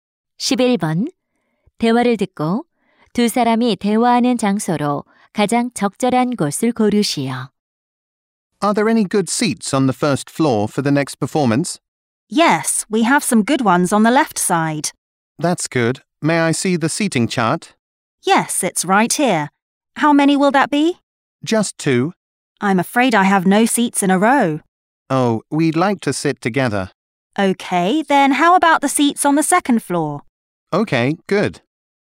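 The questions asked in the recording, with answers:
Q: 대화를 듣고 두 사람이 대화하는 장소로 가장 적절한 곳을 고르시오.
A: 공연장 매표소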